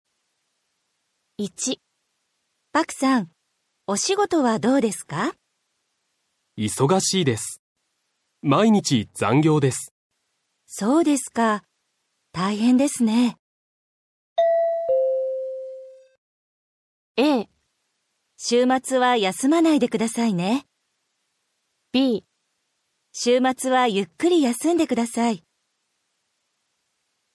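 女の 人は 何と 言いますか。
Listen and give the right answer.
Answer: b. 週末は ゆっくり 休んで ください。

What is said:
A: パクさん、 お仕事は どうですか。
B: 忙しいです。 毎日 残業です。
A: そうですか。 大変ですね。
a. 週末は 休まないで くださいね。
b. 週末は ゆっくり 休んで ください。

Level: 初級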